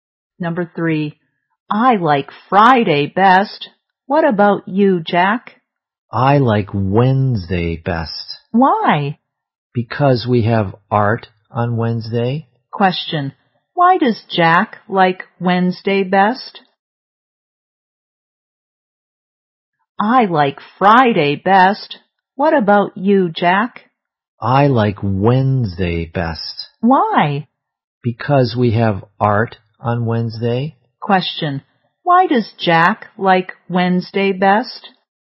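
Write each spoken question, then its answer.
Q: Why does Jack like Wednesday best?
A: Because they have art on Wednesday.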